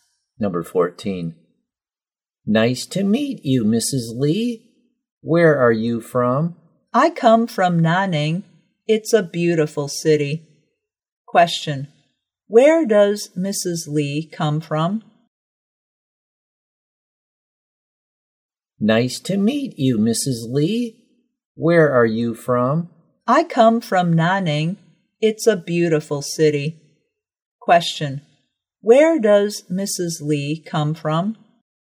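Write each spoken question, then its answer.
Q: Question, where does Mrs.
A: Nanning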